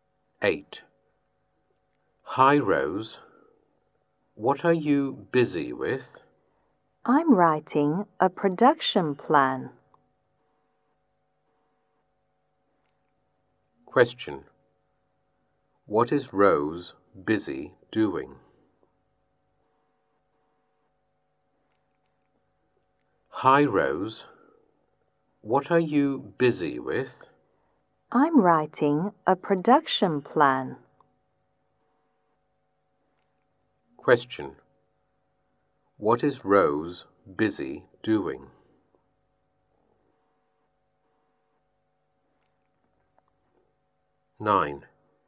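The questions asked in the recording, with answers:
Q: What is Rose busy doing?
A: Writing a production plan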